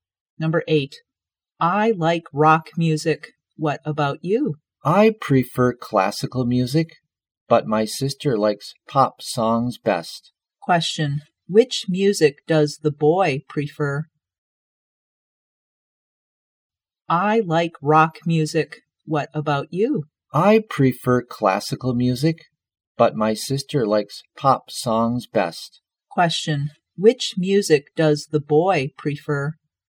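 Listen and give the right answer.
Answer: Classical music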